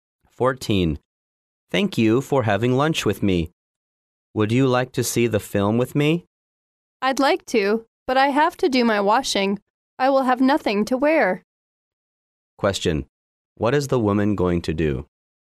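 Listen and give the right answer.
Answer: Do her washing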